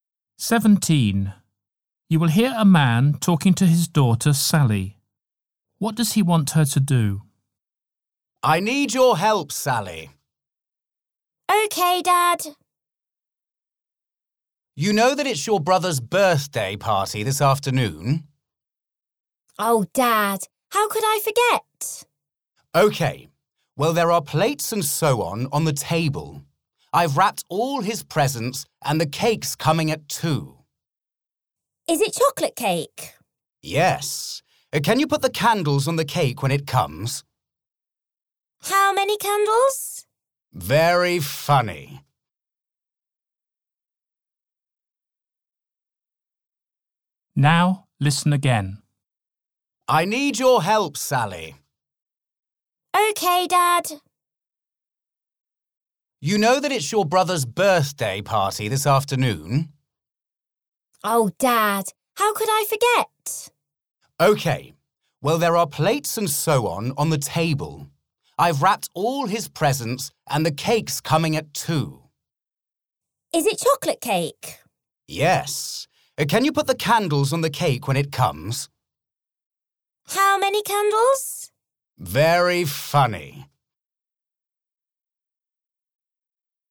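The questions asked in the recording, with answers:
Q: What does he want her to do?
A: put the candles on the birthday cake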